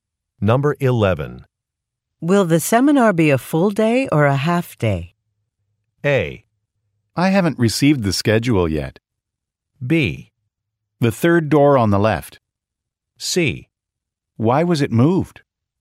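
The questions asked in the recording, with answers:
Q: Will the seminar be a full day or a half day?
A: A: I haven't received the schedule yet.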